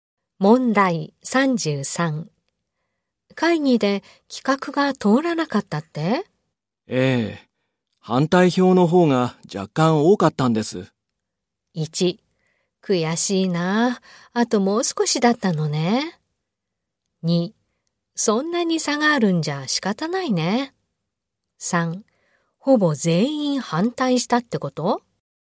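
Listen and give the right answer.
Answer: 1: 悔しいな、あともう少しだったのね。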